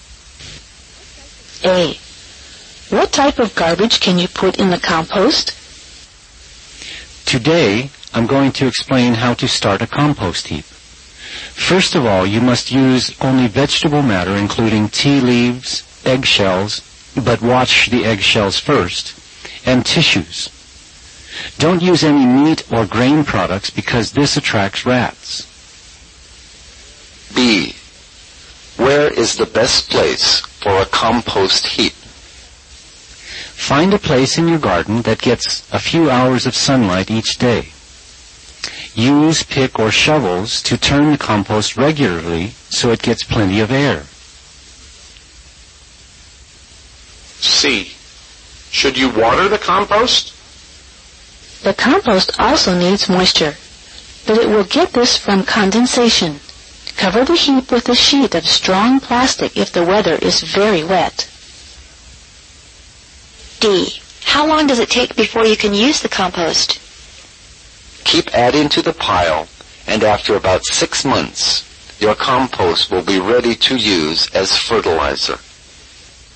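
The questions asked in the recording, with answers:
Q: What type of garbage can you put in the compost?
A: Only vegetable matter, such as tea leaves, washed eggshells and tissues

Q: Where is the best place for a compost heap?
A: A place in the garden that gets a few hours of sunlight each day

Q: Should you water the compost?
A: No, it gets moisture from condensation

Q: How long does it take before you can use the compost?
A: About 6 months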